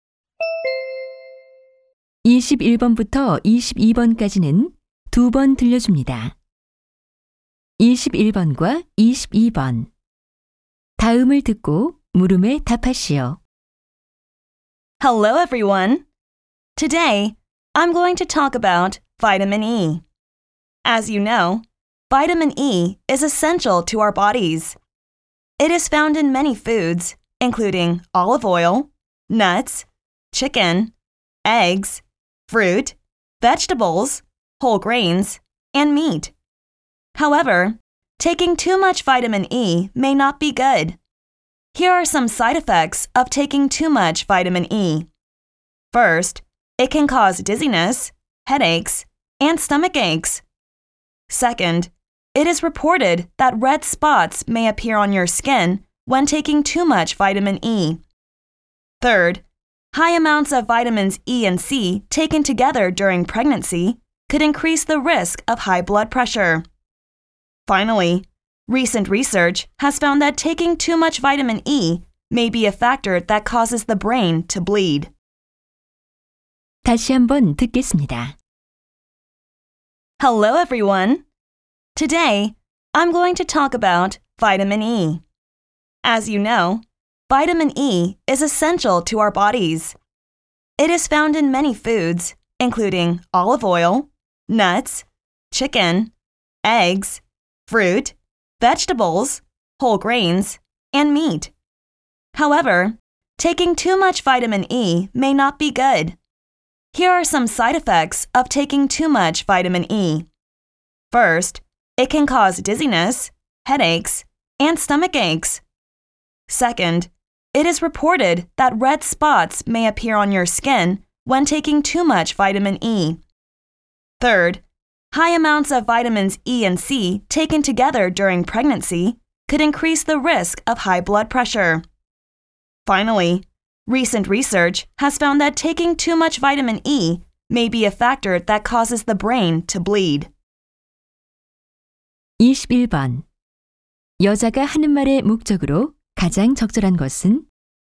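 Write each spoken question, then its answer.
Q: 여자가 하는 말의 목적으로 가장 적절한 것은?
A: 비타민 E 과다 섭취의 부작용을 알리려고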